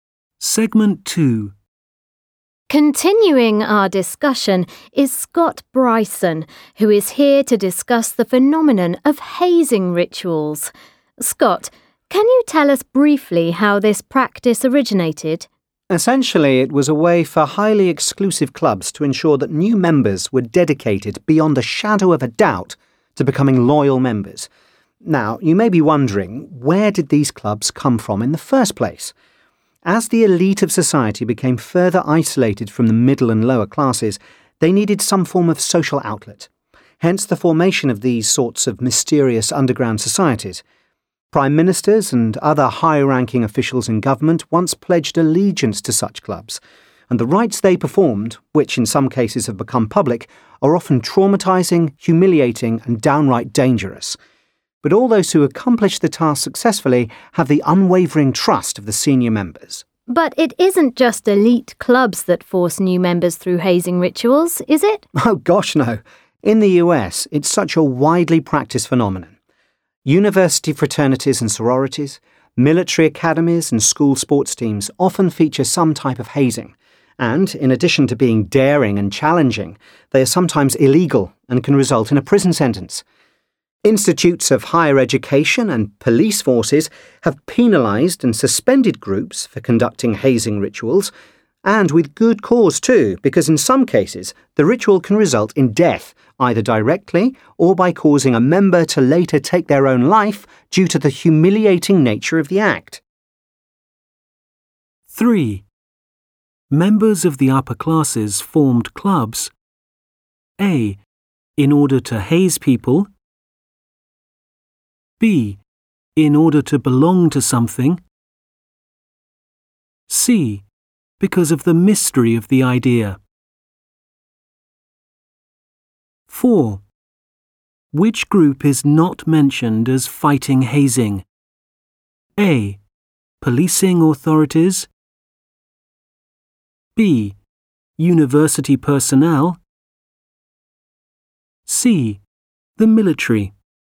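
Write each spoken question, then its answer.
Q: Members of the upper classes formed clubs.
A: B: in order to belong to something.

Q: Which group is not mentioned as fighting hazing?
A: C: The military.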